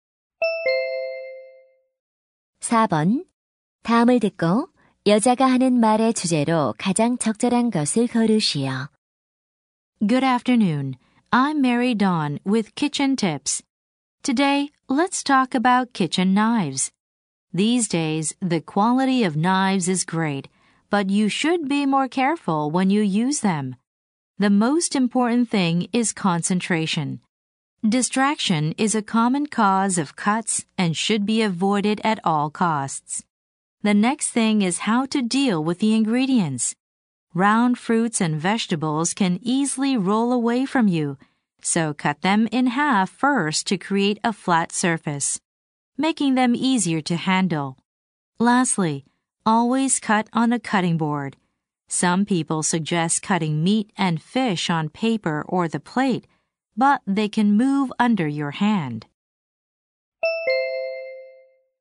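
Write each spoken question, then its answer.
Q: 다음을 듣고 여자가 하는 말의 주제로 가장 적절한 것을 고르시오.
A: 부엌칼을 안전하게 사용하는 방법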